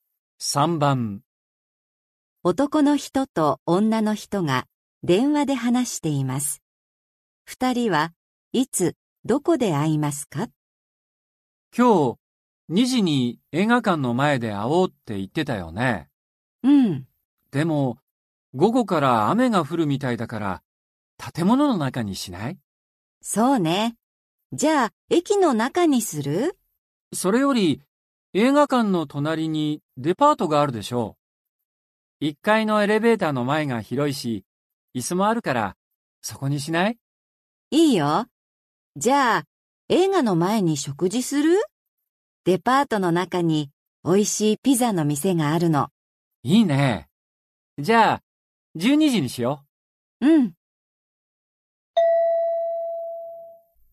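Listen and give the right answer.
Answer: 12時にデパート1階のエレベーターの前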